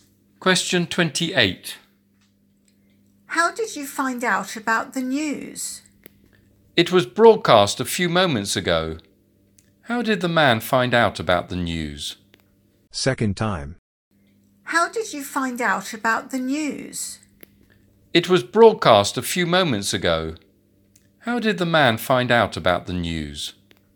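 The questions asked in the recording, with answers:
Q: How did the man find out about the news?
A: It was broadcast (on radio/TV)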